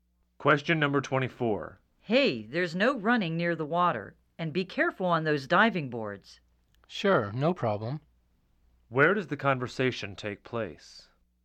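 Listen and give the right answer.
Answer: At a swimming pool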